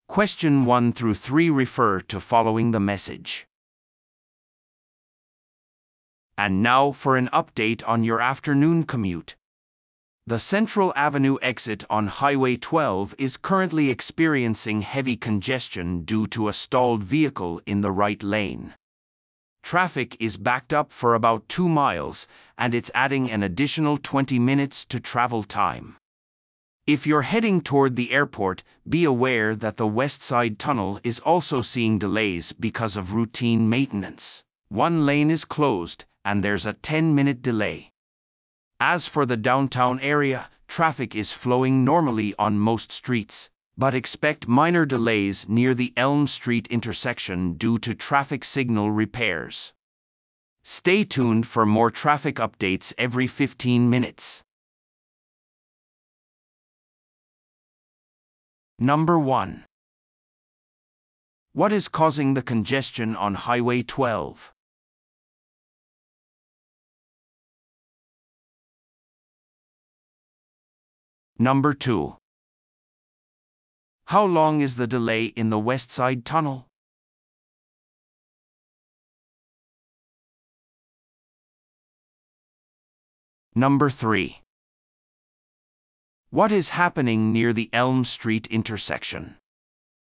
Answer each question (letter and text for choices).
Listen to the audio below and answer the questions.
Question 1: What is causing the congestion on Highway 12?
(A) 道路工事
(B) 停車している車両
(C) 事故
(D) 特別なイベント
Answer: (B) 停車している車両

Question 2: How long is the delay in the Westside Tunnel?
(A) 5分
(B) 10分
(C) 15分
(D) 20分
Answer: (B) 10分

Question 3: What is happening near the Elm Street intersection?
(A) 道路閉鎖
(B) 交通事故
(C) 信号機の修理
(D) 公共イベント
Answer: (C) 信号機の修理

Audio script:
And now for an update on your afternoon commute. The Central Avenue exit on Highway 12 is currently experiencing heavy congestion due to a stalled vehicle in the right lane. Traffic is backed up for about 2 miles, and it's adding an additional 20 minutes to travel time. If you're heading toward the airport, be aware that the Westside Tunnel is also seeing delays because of routine maintenance; one lane is closed, and there's a 10-minute delay. As for the downtown area, traffic is flowing normally on most streets, but expect minor delays near the Elm Street intersection due to traffic signal repairs. Stay tuned for more traffic updates every 15 minutes.